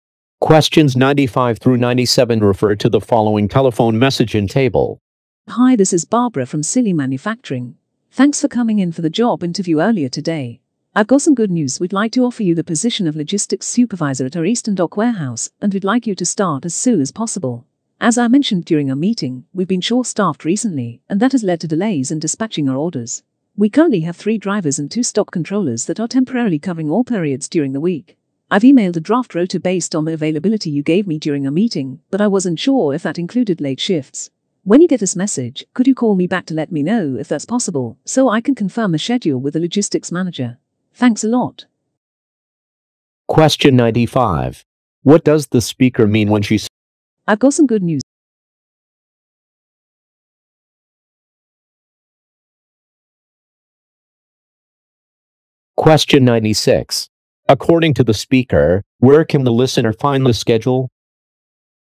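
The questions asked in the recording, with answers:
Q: What does the speaker mean when she says, I've got some good news.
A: The listener is being offered the job

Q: According to the speaker, where can the listener find the schedule?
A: In an email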